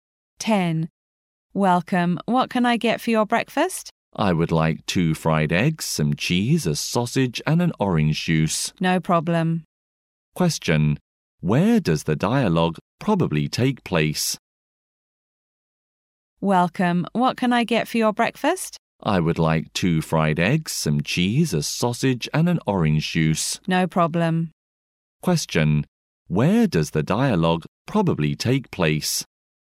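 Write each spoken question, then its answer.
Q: Where does the dialogue probably take place?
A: In a restaurant.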